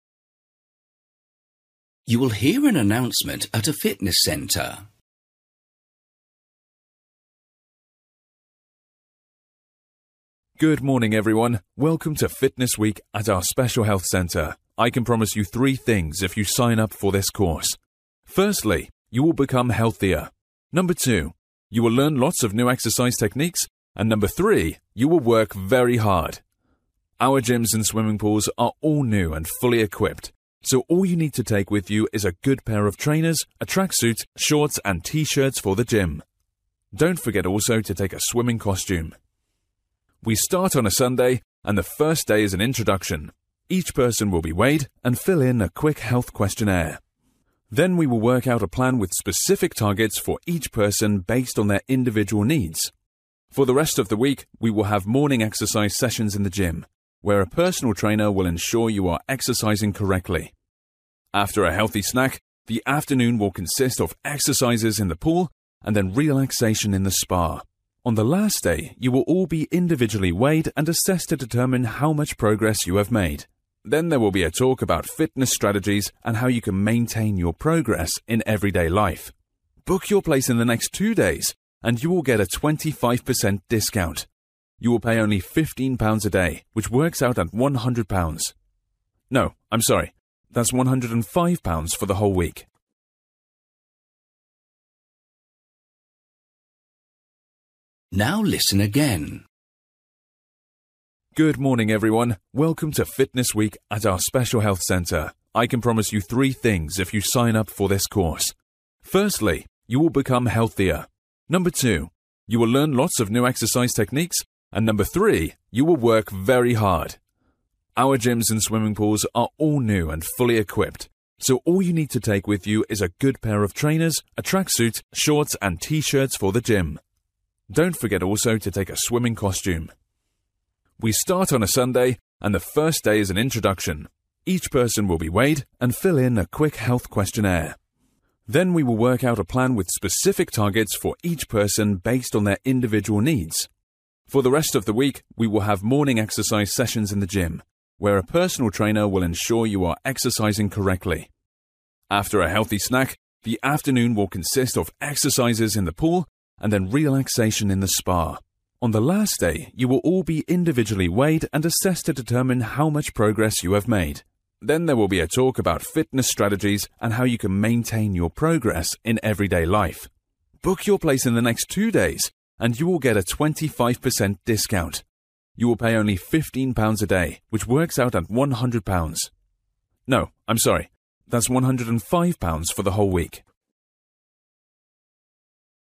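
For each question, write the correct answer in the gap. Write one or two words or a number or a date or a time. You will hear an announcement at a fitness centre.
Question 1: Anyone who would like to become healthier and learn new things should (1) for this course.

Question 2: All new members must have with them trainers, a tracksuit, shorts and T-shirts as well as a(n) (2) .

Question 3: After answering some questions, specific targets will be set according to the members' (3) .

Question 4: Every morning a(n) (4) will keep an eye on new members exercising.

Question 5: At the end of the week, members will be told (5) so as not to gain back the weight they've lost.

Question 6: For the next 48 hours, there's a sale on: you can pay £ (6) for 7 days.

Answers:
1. sign up
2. swimming costume
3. individual needs
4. personal trainer
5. fitness strategies
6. 105

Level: Luyện nghe trình độ B1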